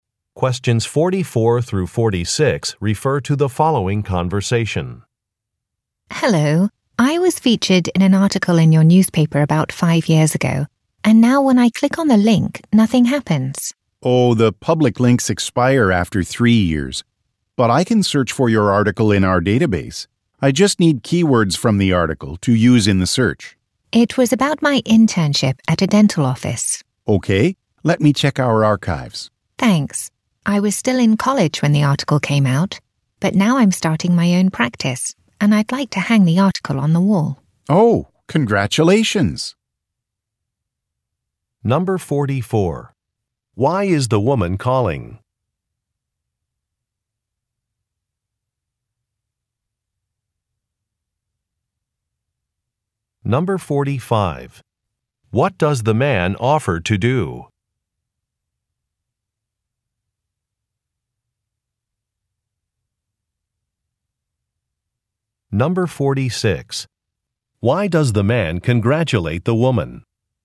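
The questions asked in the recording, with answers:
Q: Why is the woman calling?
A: A link to an article about her no longer works

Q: What does the man offer to do?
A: Search the database for her article

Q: Why does the man congratulate the woman?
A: She is starting her own practice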